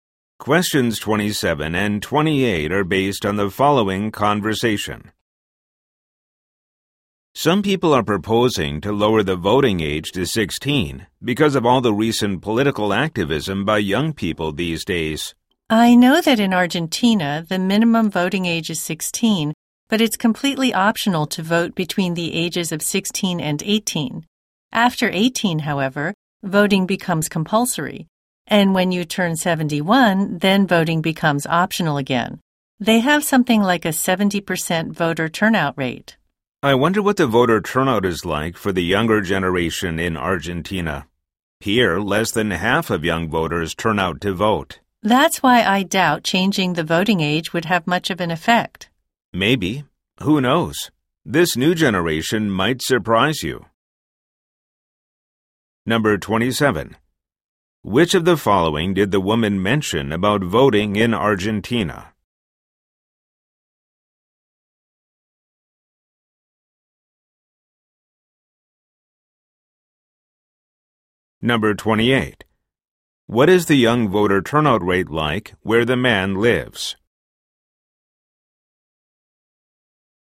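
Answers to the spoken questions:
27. Voting is optional from 16 to 18 and compulsory after 18
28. Less than half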